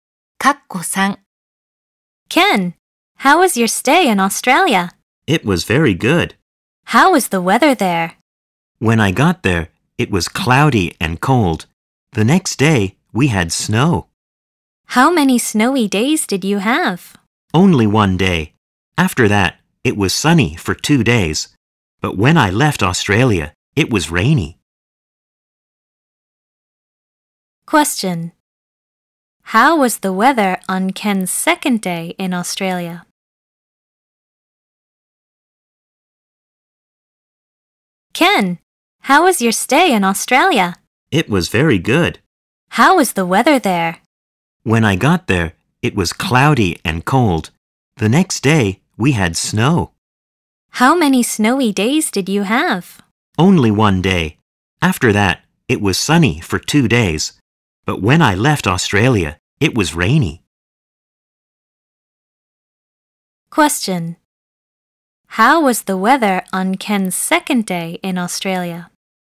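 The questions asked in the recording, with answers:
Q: Question. How was the weather on Ken's second day in Australia?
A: It snowed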